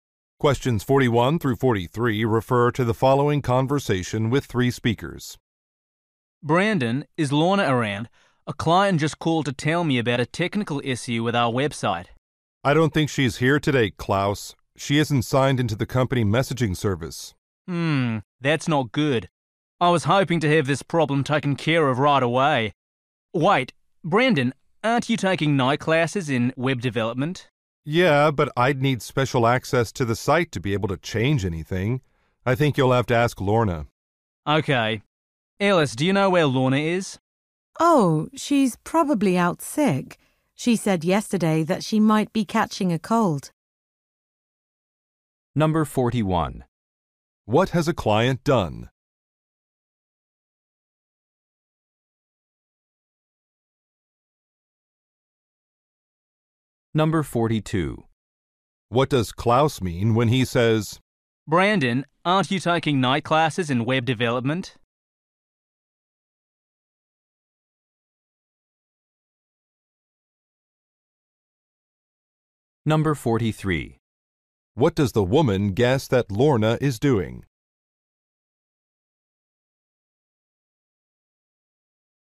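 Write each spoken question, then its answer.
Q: What has a client done?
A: Reported a technical issue with the website

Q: What does Klaus mean when he says,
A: He thinks Brandon might be able to fix the website problem

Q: What does the woman guess that Lorna is doing?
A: Staying home sick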